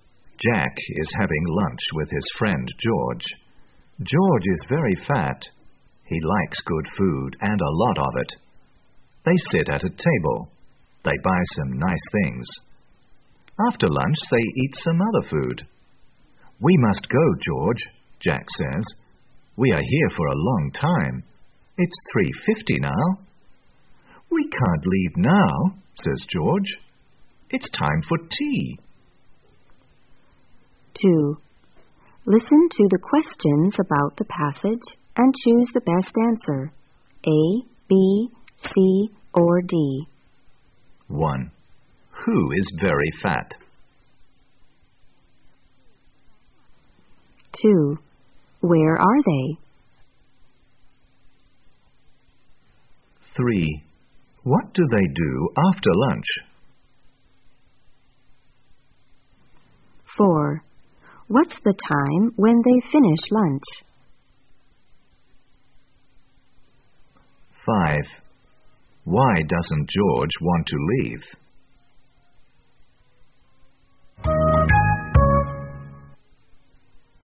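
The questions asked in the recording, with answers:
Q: Who is very fat?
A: George

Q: What do they do after lunch?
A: They eat some other food

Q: What's the time when they finish lunch?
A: 3:50

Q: Why doesn't George want to leave?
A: Because it's time for tea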